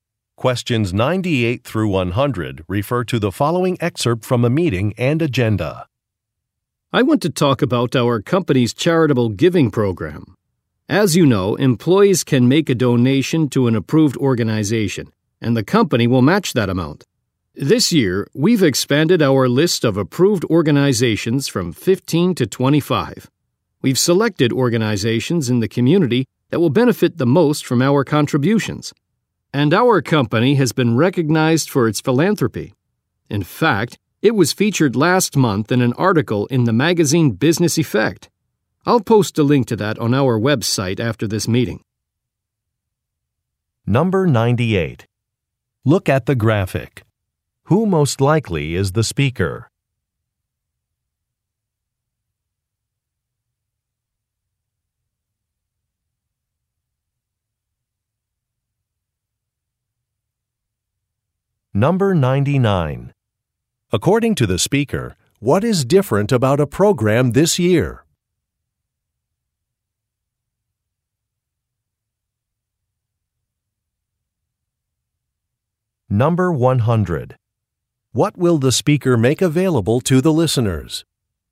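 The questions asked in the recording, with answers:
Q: According to the speaker, what is different about a program this year?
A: More approved organizations (expanded from 15 to 25)

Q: What will the speaker make available to the listeners?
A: A link to a magazine article about the company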